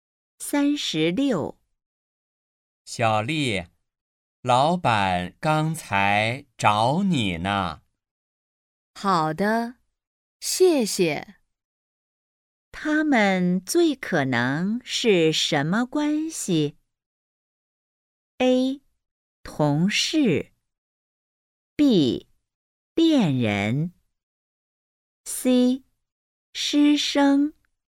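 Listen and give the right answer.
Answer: A: 同事。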